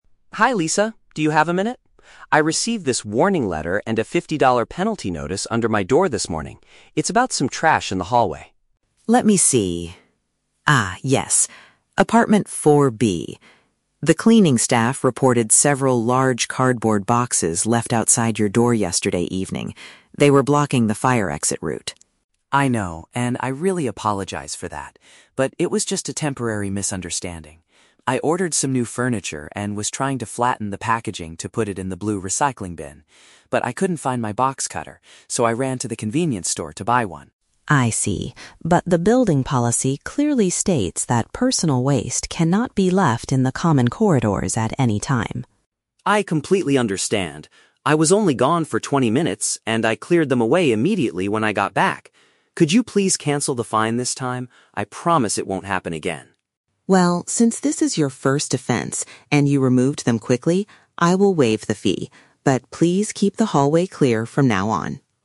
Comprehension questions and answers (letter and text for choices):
Listen to the conversation between a resident and a building manager, then choose the correct answer (A, B, or C) for each question.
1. Why did the man receive a letter from the management?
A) He placed some large items in the shared corridor.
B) He completely broke the blue recycling bin.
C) He refused to pay his monthly building fees.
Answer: A) He placed some large items in the shared corridor.

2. What was the man actually trying to do with the boxes?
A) Return them to the local furniture store.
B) Make them completely flat for recycling.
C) Give them to the cleaning staff as a gift.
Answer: B) Make them completely flat for recycling.

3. What does the manager decide to do at the end of the conversation?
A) Ask the cleaning staff to remove the boxes for him.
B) Charge the man a fifty-dollar penalty anyway.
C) Forgive the mistake and remove the financial charge.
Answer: C) Forgive the mistake and remove the financial charge.

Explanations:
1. Lisa says that "large cardboard boxes" were "left outside your door" (in the hallway). Option (A) uses paraphrasing ("large items" for "cardboard boxes", "shared corridor" for "hallway"). Option (B) is a trap; the "blue recycling bin" is mentioned as the place he wanted to put the boxes, but he didn't break it. Option (C) is a plausible reason to get a warning letter, but it is not mentioned in the audio.
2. Tom explains that he was "trying to flatten the packaging to put it in the blue recycling bin." Option (B) is a direct paraphrase ("make them completely flat" = "flatten"). Option (A) is a trap; the words "furniture" and "store" are in the audio, but he went to the store to buy a box cutter, not to return furniture. Option (C) is a trap; the "cleaning staff" reported him, he wasn't giving them a gift.
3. Lisa says, "since this is your first offense... I will waive the fee." To "waive the fee" means to remove the financial charge. Option (C) is a paraphrase of this decision. Option (A) is a trap; Tom already "cleared them away immediately," so the cleaning staff doesn't need to do it. Option (B) is a trap; the "fifty-dollar penalty" was the initial problem, but she cancels it at the end.

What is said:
Tom: Hi Lisa, do you have a minute? I received this warning letter and a fifty-dollar penalty notice under my door this morning. It's about some trash in the hallway.
Lisa: Let me see... Ah, yes. Apartment 4B. The cleaning staff reported several large cardboard boxes left outside your door yesterday evening. They were blocking the fire exit route.
Tom: I know, and I really apologize for that. But it was just a temporary misunderstanding. I ordered some new furniture and was trying to flatten the packaging to put it in the blue recycling bin. But I couldn't find my box cutter, so I ran to the convenience store to buy one.
Lisa: I see. But the building policy clearly states that personal waste cannot be left in the common corridors at any time.
Tom: I completely understand. I was only gone for twenty minutes, and I cleared them away immediately when I got back. Could you please cancel the fine this time? I promise it won't happen again.
Lisa: Well, since this is your first offense and you removed them quickly, I will waive the fee. But please keep the hallway clear from now on.